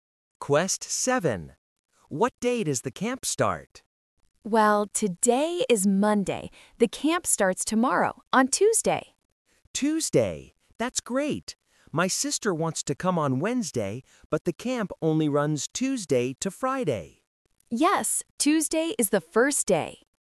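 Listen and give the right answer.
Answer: Tuesday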